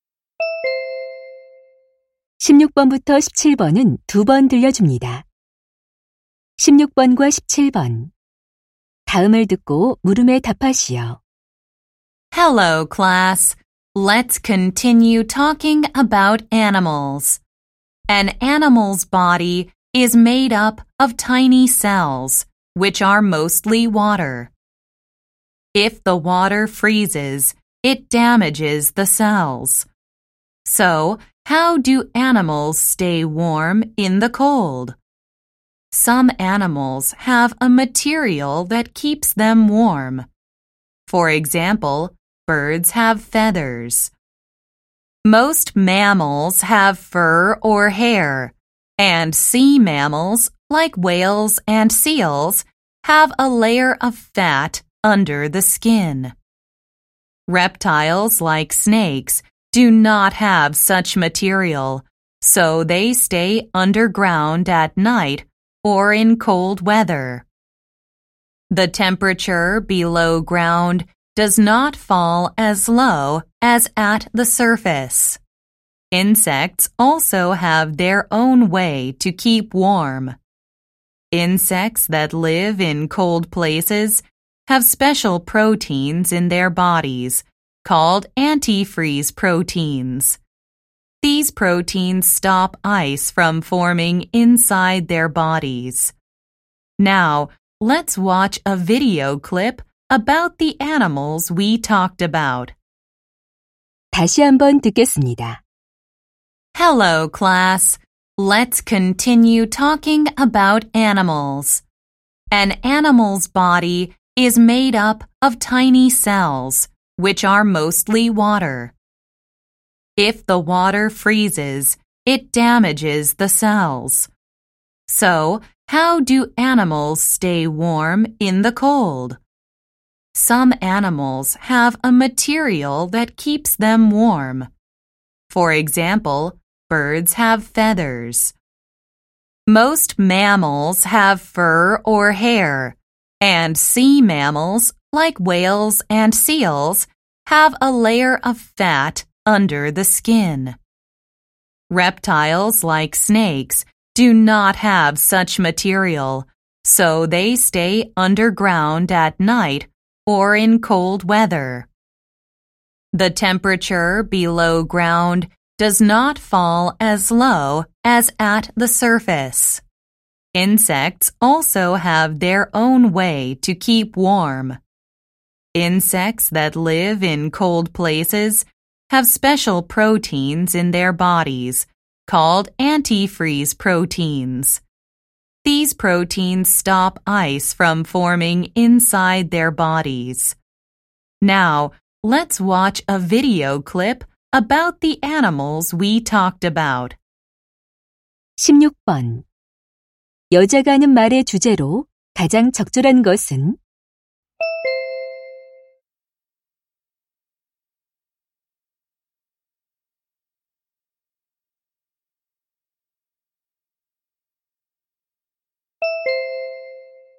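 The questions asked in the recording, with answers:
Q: 여자가 하는 말의 주제로 가장 적절한 것은?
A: 동물들이 추위에 체온을 유지하는 방법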